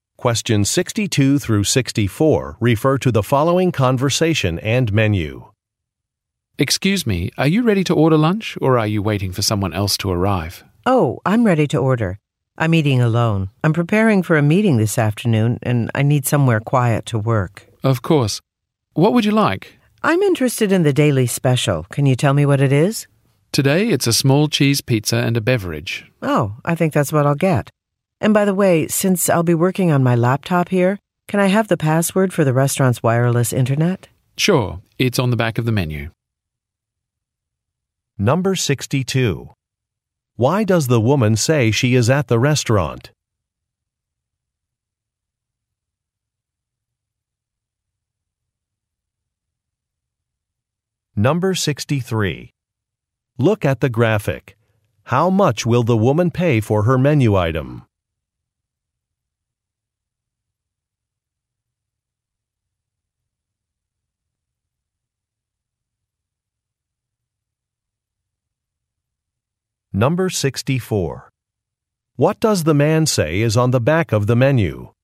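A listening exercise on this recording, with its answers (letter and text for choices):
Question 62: Why does the woman say she is at the restaurant?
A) To celebrate a contract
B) To evaluate a business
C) To prepare for a meeting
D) To interview for a job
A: C) To prepare for a meeting

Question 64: What does the man say is on the back of the menu?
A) A dessert list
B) A password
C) A Web site address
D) Nutrition information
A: B) A password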